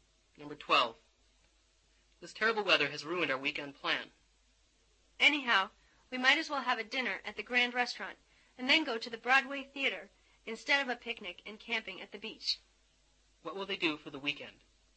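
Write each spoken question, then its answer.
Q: What will they do for the weekend?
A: Have dinner at the Grand Restaurant and go to the Broadway Theater.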